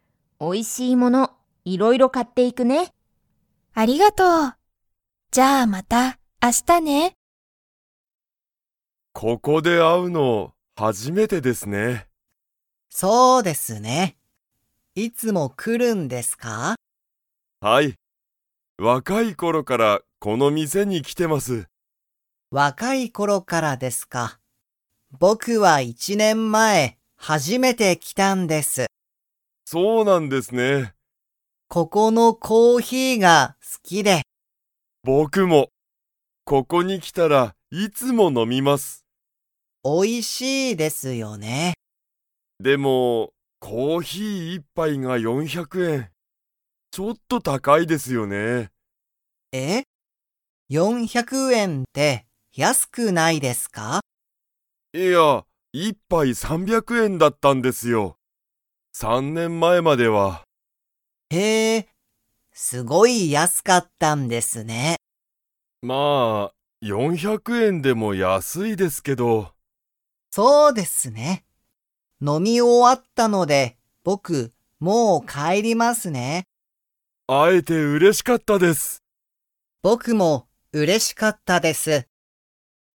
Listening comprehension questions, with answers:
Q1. 有田(ありた)さんと林(はやし)さんは、いつもこのカフェで会(あ)いますか?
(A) はい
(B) いいえ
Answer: いいえ

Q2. 有田(ありた)さんは、____この店(みせ)に来(き)ている。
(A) 1(いち)年前(ねんまえ)から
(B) 3(さん)年前(ねんまえ)から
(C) 若(わか)い頃(ころ)から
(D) 今日初(きょうはじ)めて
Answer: 若(わか)い頃(ころ)から

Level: Level 2

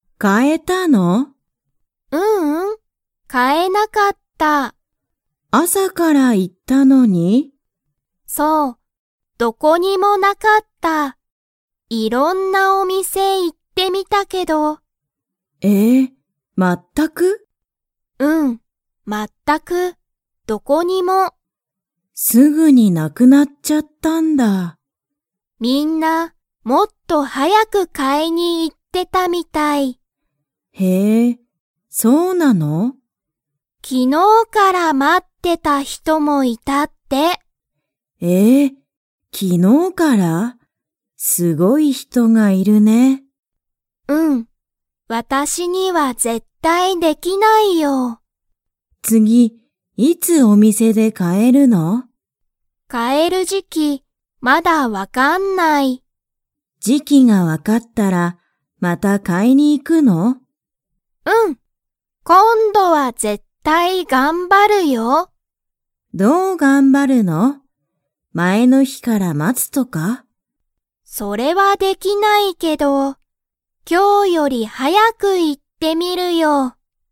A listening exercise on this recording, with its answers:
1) アキは、いろんな____に行(い)ってみた。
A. お店(みせ)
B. カフェ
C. 時期(じき)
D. 会社(かいしゃ)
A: お店(みせ)

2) アキはまた買(か)いに行(い)きますか?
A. はい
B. いいえ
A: はい

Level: Level 2

